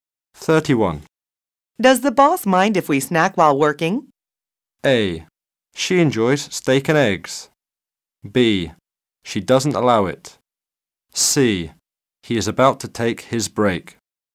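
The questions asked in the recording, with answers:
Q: Does the boss mind if we snack while working?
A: B: She doesn't allow it.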